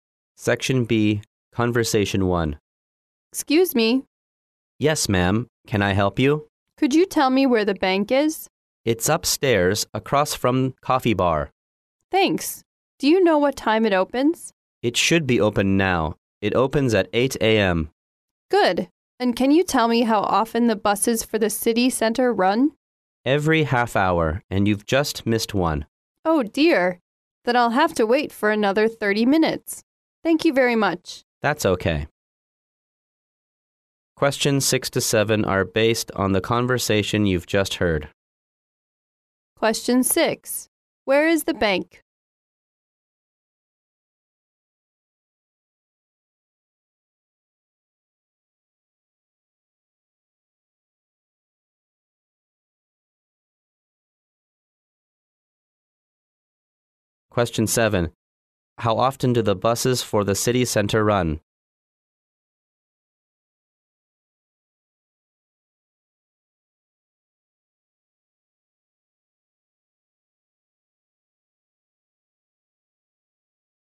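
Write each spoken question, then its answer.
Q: Where is the bank?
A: Upstairs, across from the coffee bar

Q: How often do the buses for the city center run?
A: Every half hour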